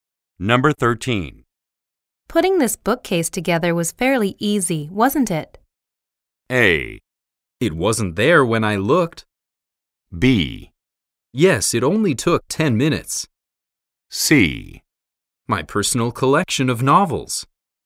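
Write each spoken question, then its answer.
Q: Putting this bookcase together was fairly easy, wasn't it?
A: B: Yes, it only took 10 minutes.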